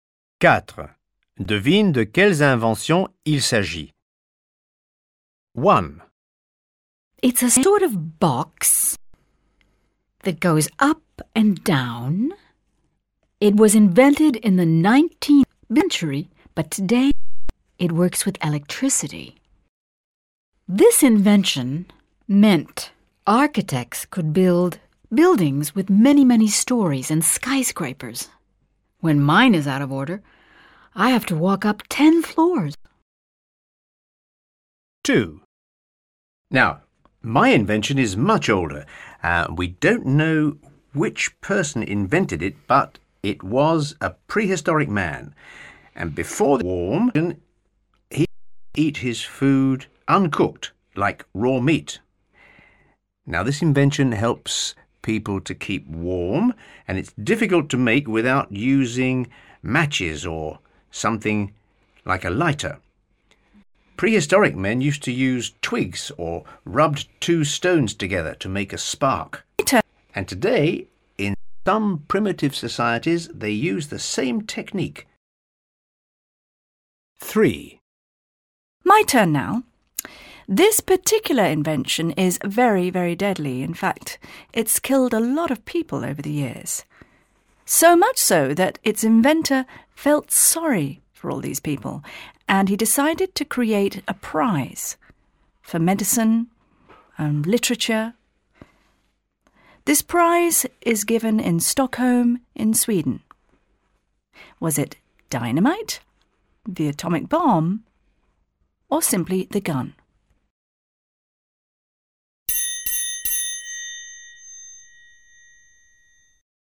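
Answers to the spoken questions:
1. the elevator
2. fire
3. dynamite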